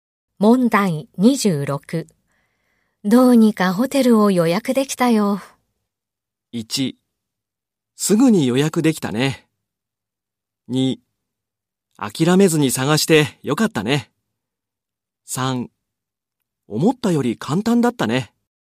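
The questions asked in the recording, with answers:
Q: どうにかホテルを予約できたよ。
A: 2: 諦めずに探してよかったね。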